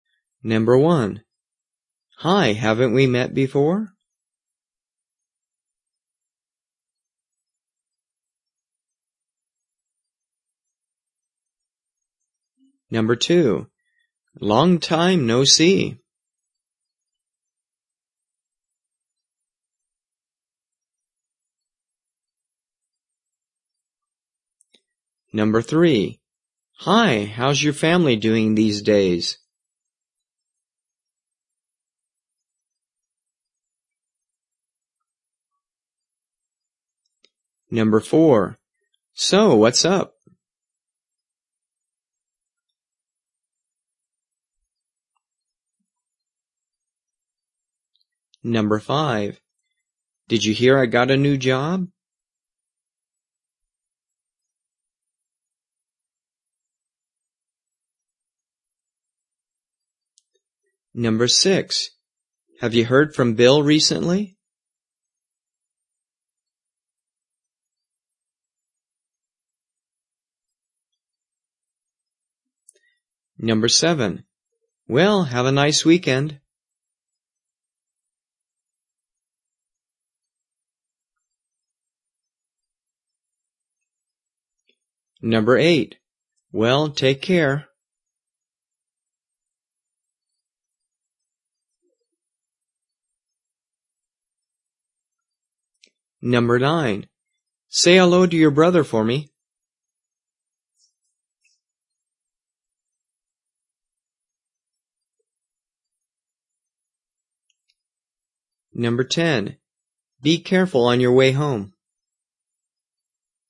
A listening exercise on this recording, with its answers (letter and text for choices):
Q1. Hi. Haven't we _______ before?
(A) Yes. I believe we have.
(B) Nice to meet you too.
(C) Nothing special.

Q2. Long time, ________________.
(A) I see you too.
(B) It has been a long time.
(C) How about you?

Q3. Hi, how's _________________________?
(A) Five people.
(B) Oh really?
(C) They're fine.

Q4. So, _________________________?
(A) Pretty good.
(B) That's too bad.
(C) Nothing much.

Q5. Did you hear __________________________?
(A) Oh, what a shame.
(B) Hey, that's fantastic.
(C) I like my job too.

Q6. Have you ____________ from Bill ___________________?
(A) Yes. He's still working downtown.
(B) No. Bill is not here now.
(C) Yes. Bill is twenty-three.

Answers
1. (A) Yes. I believe we have.
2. (B) It has been a long time.
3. (C) They're fine.
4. (C) Nothing much.
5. (B) Hey, that's fantastic.
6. (A) Yes. He's still working downtown.

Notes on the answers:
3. Hi, how's your family these days?

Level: 初级